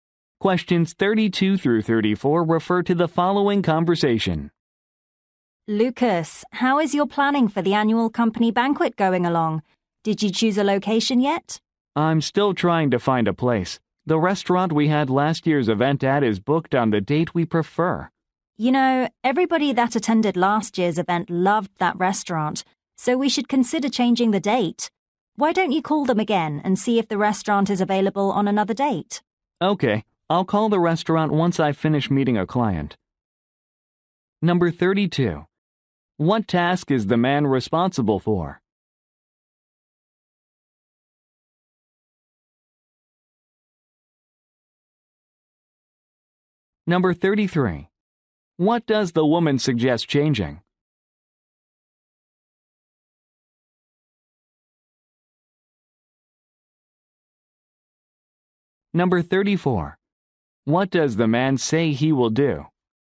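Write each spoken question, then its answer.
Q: What task is the man responsible for?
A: Planning the annual company banquet

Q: What does the woman suggest changing?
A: The date of the event

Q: What does the man say he will do?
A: Call the restaurant after meeting a client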